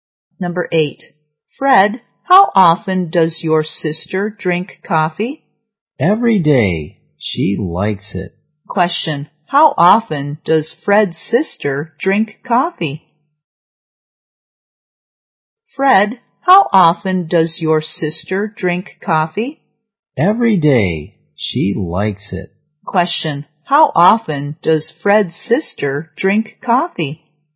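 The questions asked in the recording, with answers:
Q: How often does Fred's sister drink coffee?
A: Every day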